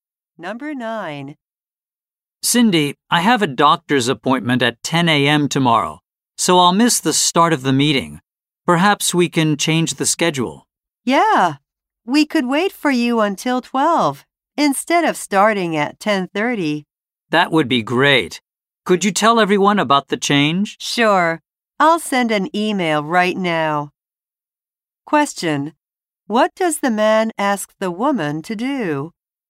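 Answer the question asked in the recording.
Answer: Tell everyone that the meeting time has changed.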